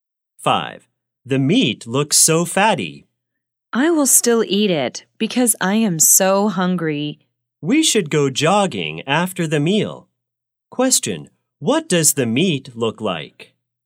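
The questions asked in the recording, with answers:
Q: what does the meat look like?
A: Fatty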